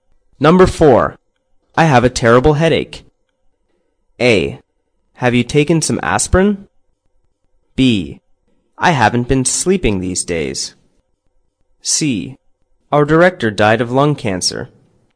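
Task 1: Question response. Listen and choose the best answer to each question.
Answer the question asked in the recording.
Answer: Have you taken some aspirin?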